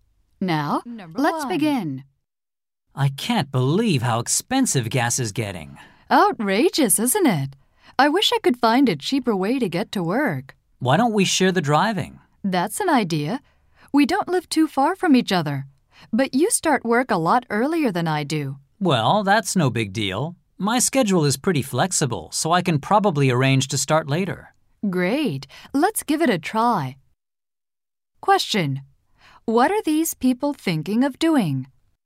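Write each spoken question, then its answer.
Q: What are these people thinking of doing?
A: Sharing the driving to work (carpooling)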